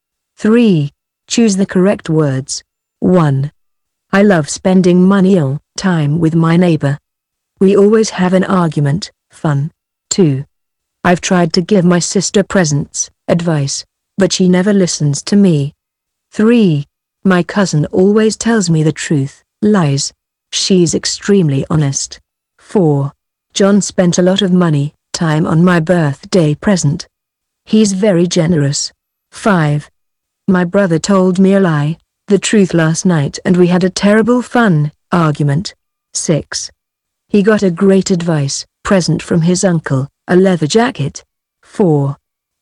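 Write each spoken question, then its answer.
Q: I love spending money all time with my neighbor. We always have an argument, fun.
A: time; fun

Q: I've tried to give my sister presents, advice, but she never listens to me.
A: advice

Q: My cousin always tells me the truth, lies.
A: the truth

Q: John spent a lot of money, time on my birthday present.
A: money

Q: My brother told me a lie, the truth last night, and we had a terrible fun argument.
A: a lie; argument

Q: He got a great advice present from his uncle, a leather jacket.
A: present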